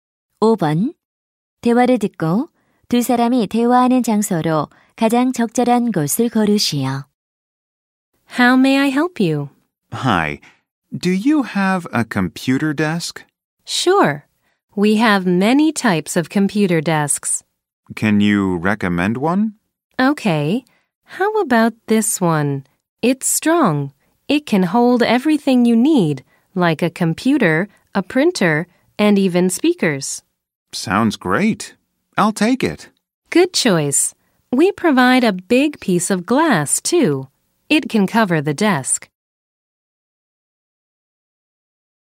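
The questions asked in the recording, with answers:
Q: 대화를 듣고 두 사람이 대화하는 장소로 가장 적절한 곳을 고르시오.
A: 가구점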